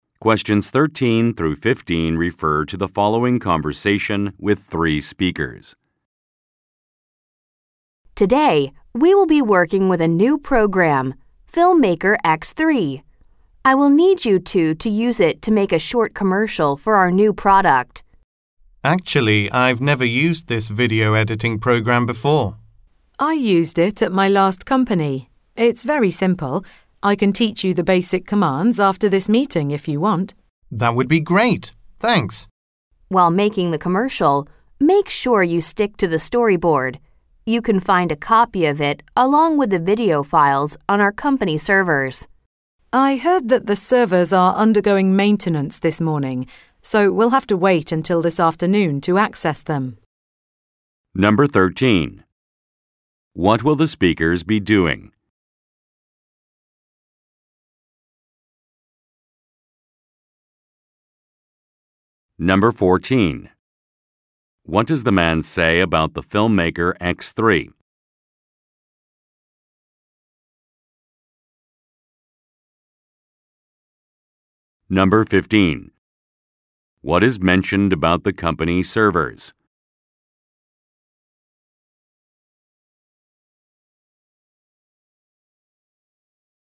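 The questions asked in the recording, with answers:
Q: What will the speakers be doing?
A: Making a short commercial for a new product using a video editing program

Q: What does the man say about the filmmaker X3?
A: He used it at his last company and it is very simple

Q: What is mentioned about the company servers?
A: They are undergoing maintenance this morning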